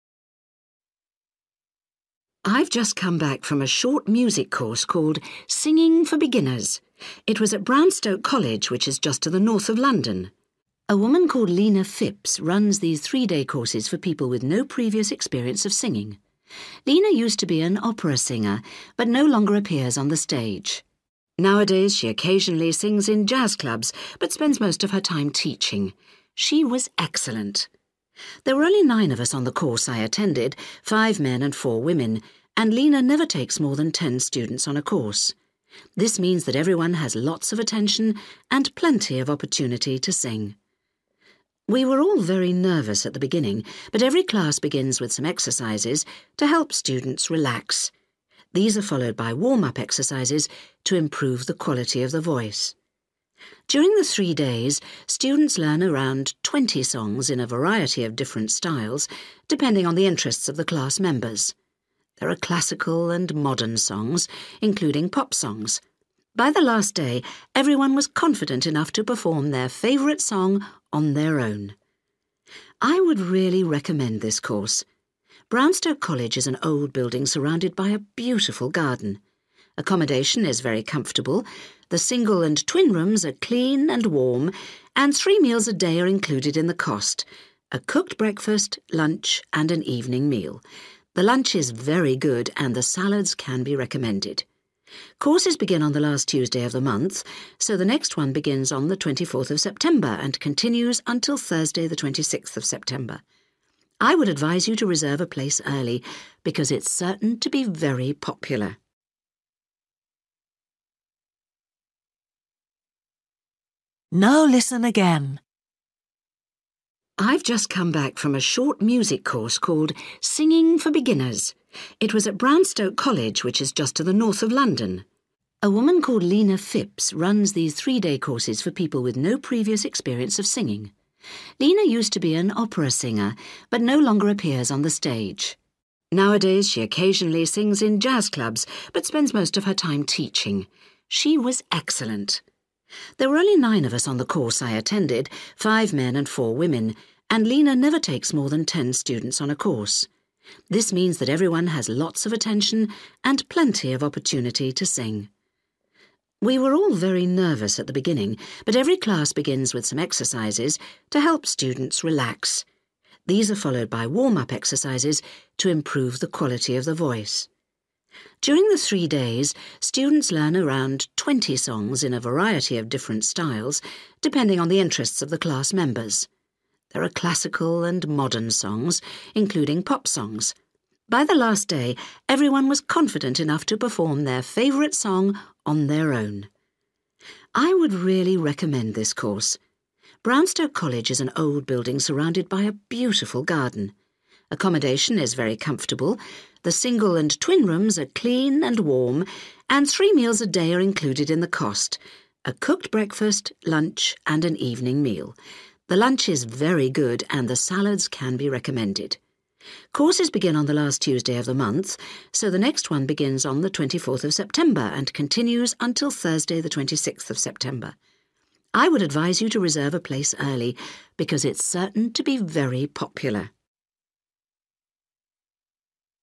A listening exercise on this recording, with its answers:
For each question, fill in the missing information in the numbered space.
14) Lena Phipps, a very good former (14) ........................... singer is the tutor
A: O/opera(s)

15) the maximum number of students per course is (15) ...........................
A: T/ten (students) /10

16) all classes start with exercises that help students to (16) ...........................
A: (to) R/relax

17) students learn to sing (17) ........................... , modern and pop songs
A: C/classic(al) (s) (songs)

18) there's a very good lunch, especially (18) ...........................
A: (the) S/salad (s) (bar)

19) Date the next course starts: (19) ........................... , 24th September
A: T/Tuesday T/tues

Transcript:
Interviewer: I've just come back from a short music course called Singing for Beginners. It was at Brownstoke College, which is just to the north of London.
A woman called Lena Phipps runs these three-day courses for people with no previous experience of singing. Lena used to be an opera singer, but no longer appears on the stage. Nowadays she occasionally sings in jazz clubs, but spends most of her time teaching. She was excellent!
There were only nine of us on the course I attended, five men and four women, and Lena never takes more than ten students on a course. This means that everyone has lots of attention and plenty of opportunity to sing.
We were all very nervous at the beginning, but every class begins with some exercises to help students relax. These are followed by warm-up exercises to improve the quality of the voice.
During the three days, students learn around twenty songs in a variety of different styles, depending on the interests of the class members. There are classical and modern songs, including pop songs. By the last day, everyone was confident enough to perform their favourite song on their own!
I would really recommend this course. Brownstoke College is an old building surrounded by a beautiful garden. Accommodation is very comfortable – the single and twin rooms are clean and warm, and three meals a day are included in the cost; a cooked breakfast, lunch and an evening meal. The lunch is very good, and the salads can be recommended.
Courses begin on the last Tuesday of the month, so the next one begins on the 24th of September and continues until Thursday the 26th of September. I would advise you to reserve a place early, because it's certain to be very popular.

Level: B1